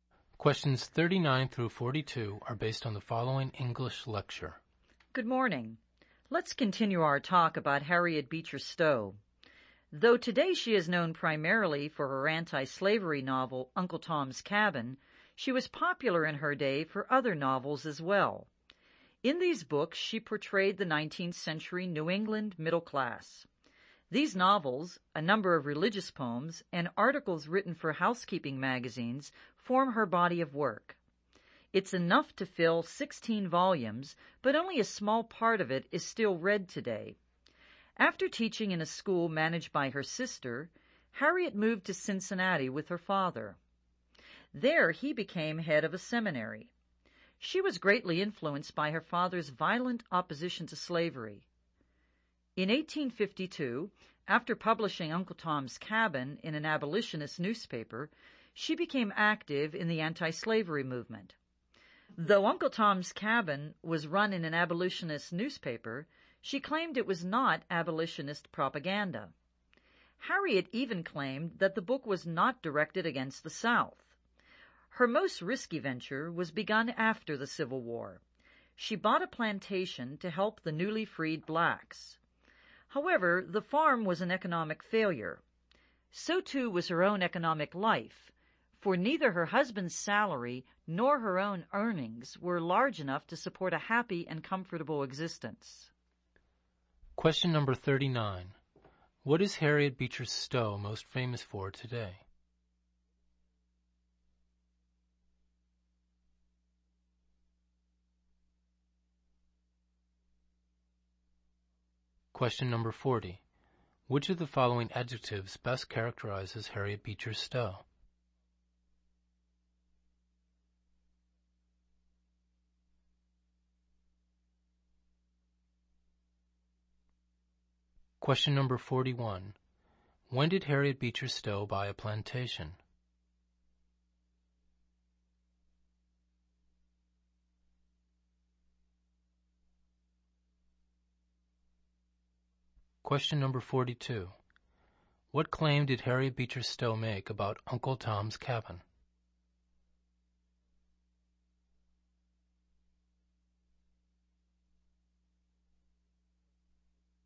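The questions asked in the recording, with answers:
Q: What is Harriet Beecher Stowe most famous for today?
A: Her anti-slavery novel, Uncle Tom's Cabin

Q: When did Harriet Beecher Stowe buy a plantation?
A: After the Civil War

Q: What claim did Harriet Beecher Stowe make about Uncle Tom's Cabin?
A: That it was not abolitionist propaganda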